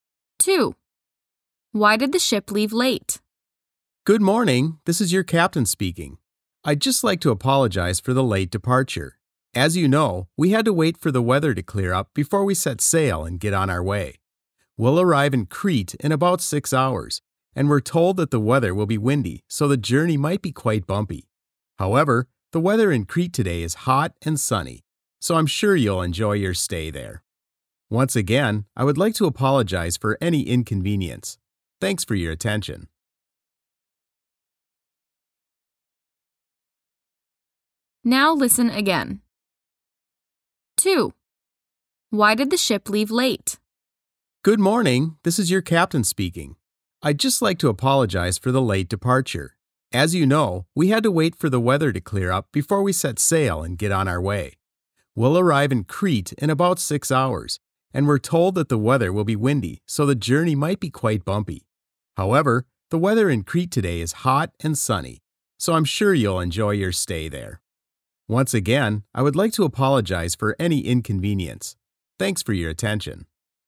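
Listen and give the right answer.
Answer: They had to wait for the weather to clear up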